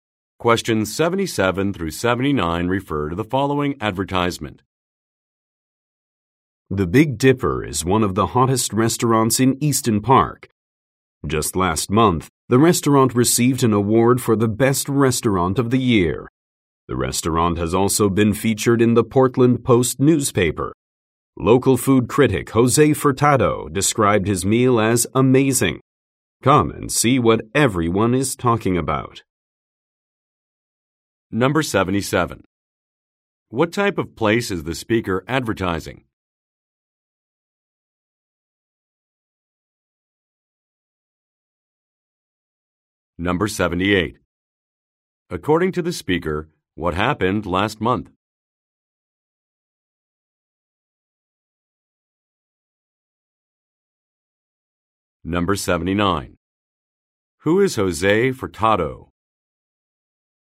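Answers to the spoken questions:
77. A restaurant
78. The restaurant won an award
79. A food critic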